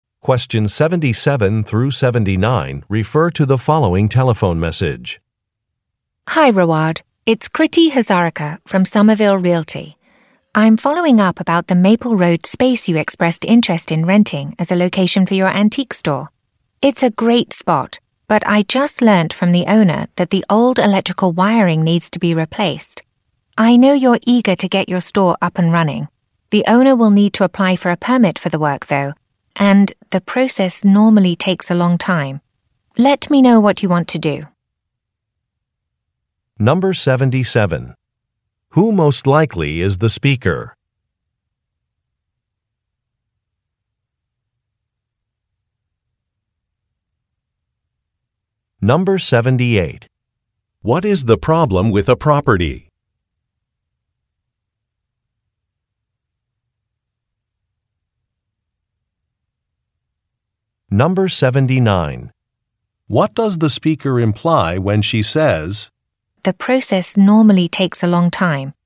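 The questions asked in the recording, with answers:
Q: Who most likely is the speaker?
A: A real estate agent

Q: What is the problem with a property?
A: The old electrical wiring needs to be replaced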